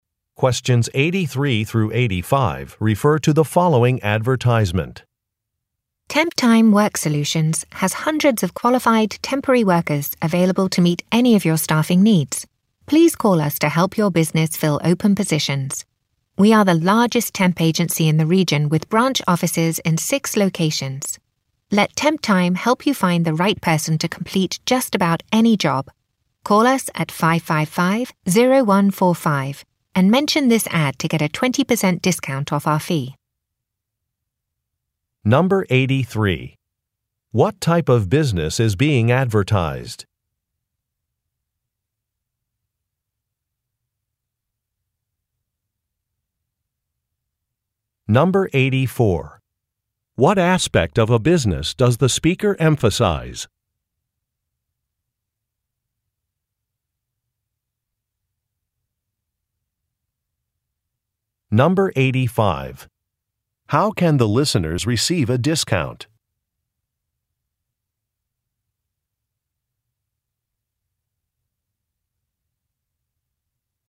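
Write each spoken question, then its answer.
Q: What type of business is being advertised?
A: A temporary staffing agency

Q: How can the listeners receive a discount?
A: By calling and mentioning the ad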